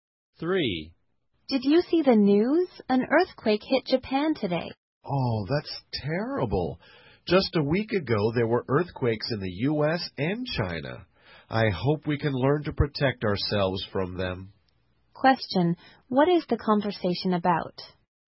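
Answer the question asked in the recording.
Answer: Recent earthquakes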